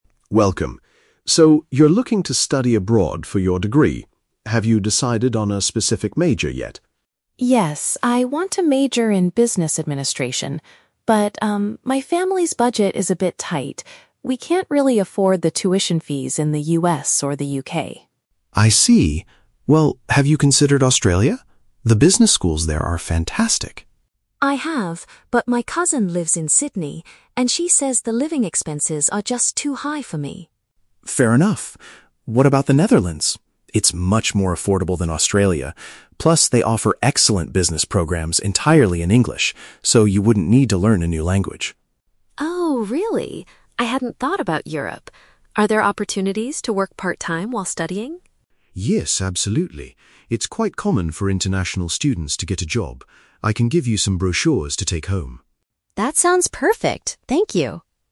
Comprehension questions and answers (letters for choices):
Listen to the conversation between a high school student and a study abroad advisor. Read the questions below and choose the correct answer (A, B, or C) for each.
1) Why does the student immediately reject the idea of studying in the US or the UK?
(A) She believes the academic programs there are too difficult.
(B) Her family does not have enough money for the educational costs.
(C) She wants to avoid living with her relatives in those countries.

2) What is the main reason Australia is crossed off their list of options?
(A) The cost of daily life and housing is too expensive there.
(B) The university tuition fees are the highest in the world.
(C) The student's cousin advised her not to study Business.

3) Why does the advisor recommend the Netherlands as a good choice?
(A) The universities provide top-tier Business degrees taught in English.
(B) The living expenses are completely free for international learners.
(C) Students are guaranteed a high-paying part-time job upon arrival.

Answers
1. B
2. A
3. A

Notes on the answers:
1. The Key (Correct): The student states that her family's budget is "tight" and they "can't really afford the tuition fees." (Paraphrased: tuition fees = educational costs; can't afford = does not have enough money). The Trap: Option (C) mentions "relatives," which connects to her cousin, but her cousin lives in Australia, not the US or UK. Not mentioned: Option (A) is plausible for prestigious universities, but the difficulty of the programs is not discussed.
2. The Key (Correct): The student says her cousin warned her that "the living expenses are just too high." (Paraphrased: living expenses = cost of daily life and housing). The Trap: Option (B) is incorrect because "tuition fees" (university costs) were the reason for rejecting the US and UK, not Australia. Option (C) is a trap because the cousin is mentioned, but she talked about money, not the Business major.
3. The Key (Correct): The advisor suggests the Netherlands because they offer "excellent Business programs entirely in English." (Paraphrased: excellent = top-tier). The Trap: Option (B) is incorrect. The advisor says the Netherlands is "more affordable," not "completely free." Not mentioned: Option (C) is a trap. Part-time work is mentioned as "common," but there is no mention of a job being "guaranteed" or "high-paying."

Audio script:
Advisor: Welcome! So, you're looking to study abroad for your degree. Have you decided on a specific major yet?
Student: Yes, I want to major in Business Administration. But, um, my family's budget is a bit tight. We can't really afford the tuition fees in the US or the UK.
Advisor: I see. Well, have you considered Australia? The business schools there are fantastic.
Student: I have, but my cousin lives in Sydney, and she says the living expenses are just too high for me.
Advisor: Fair enough. What about the Netherlands? It's much more affordable than Australia. Plus, they offer excellent Business programs entirely in English, so you wouldn't need to learn a new language.
Student: Oh, really? I hadn't thought about Europe. Are there opportunities to work part-time while studying?
Advisor: Yes, absolutely. It's quite common for international students to get a job. I can give you some brochures to take home.